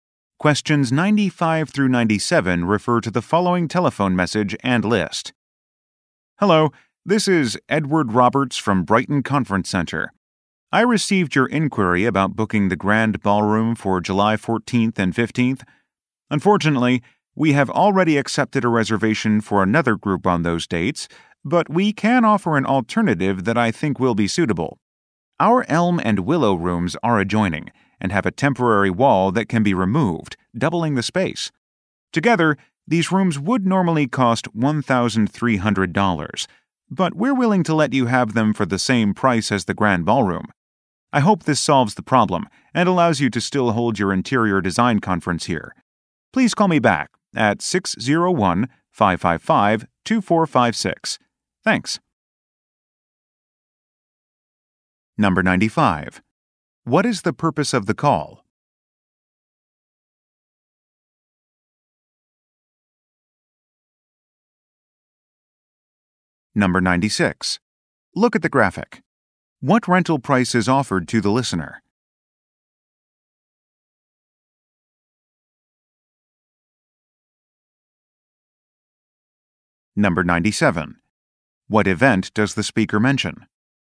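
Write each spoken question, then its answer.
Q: What is the purpose of the call?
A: To offer alternative rooms for a booking

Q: What event does the speaker mention?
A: An interior design conference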